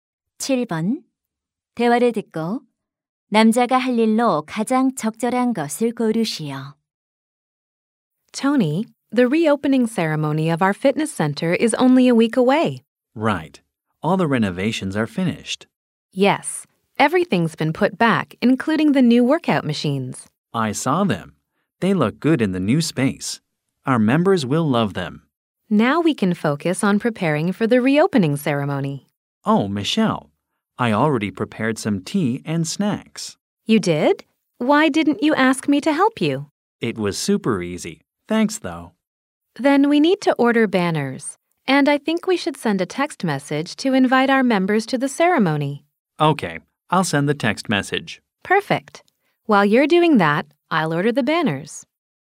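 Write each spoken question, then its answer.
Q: 대화를 듣고 남자가 할 일로 가장 적절한 것을 고르시오.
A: 회원들에게 초대 문자 메시지 보내기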